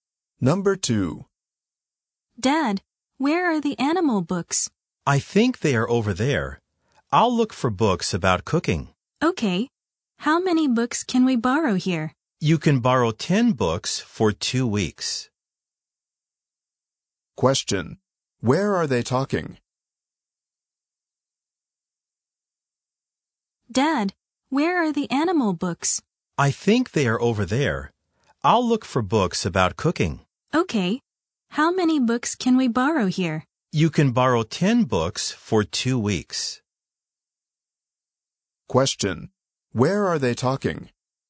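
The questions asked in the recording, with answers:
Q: Where are they talking?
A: At a library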